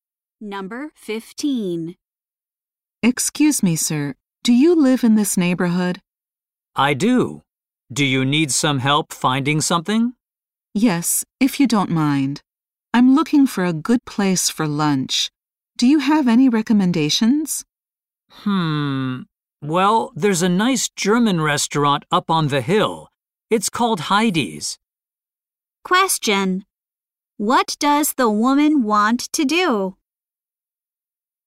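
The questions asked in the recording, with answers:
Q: What does the woman want to do?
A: Find a good place to eat lunch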